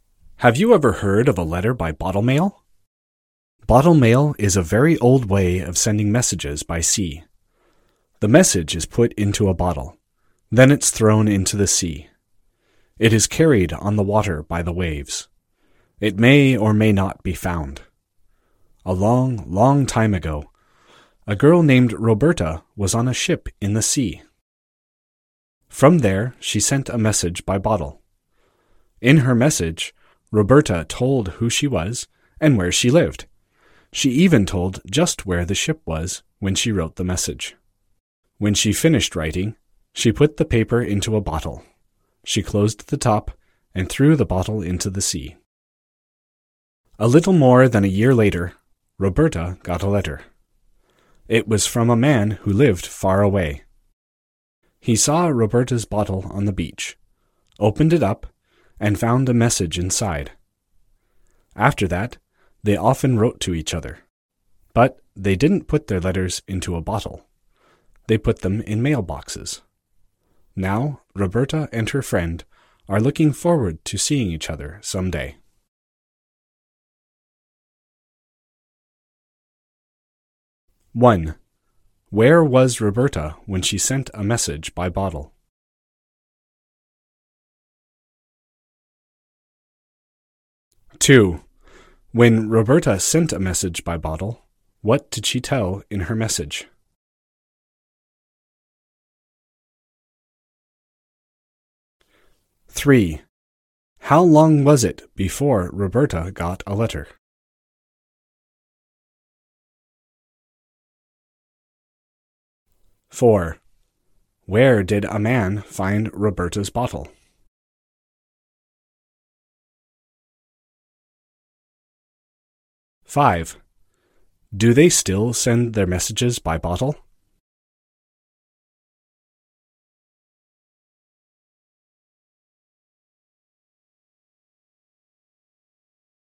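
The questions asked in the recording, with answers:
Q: Where was Roberta when she sent a message by bottle?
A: On a ship in the sea

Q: When Roberta sent a message by bottle, what did she tell in her message?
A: Who she was, where she lived, and where the ship was

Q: How long was it before Roberta got a letter?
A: A little more than a year

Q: Where did a man find Roberta's bottle?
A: On the beach

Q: Do they still send their messages by bottle?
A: No, they put them in mailboxes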